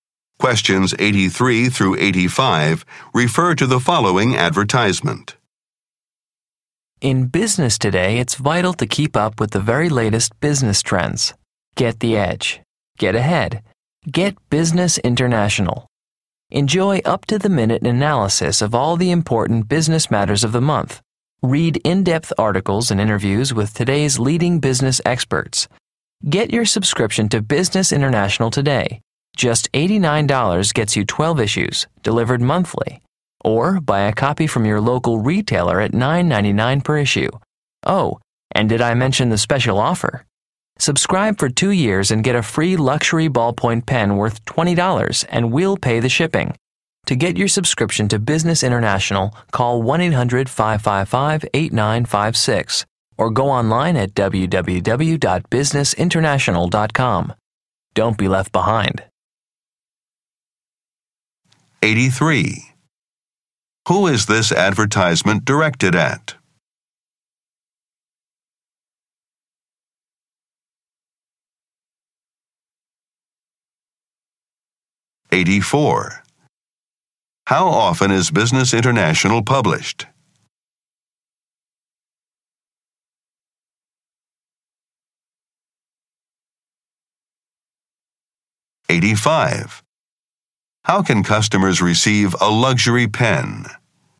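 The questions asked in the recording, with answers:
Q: Who is this advertisement directed at?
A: Business people

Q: How often is Business International published?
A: Monthly

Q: How can customers receive a luxury pen?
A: By subscribing for 2 years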